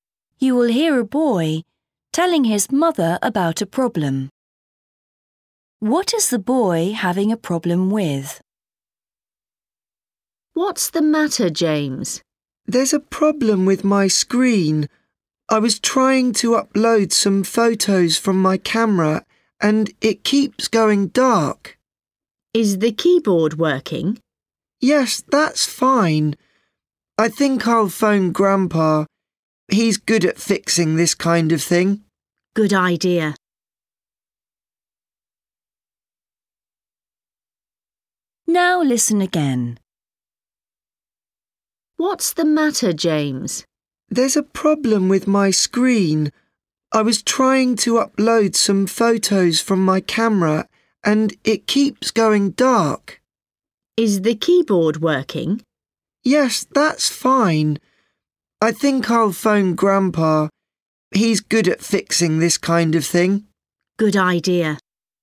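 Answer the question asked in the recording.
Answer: his screen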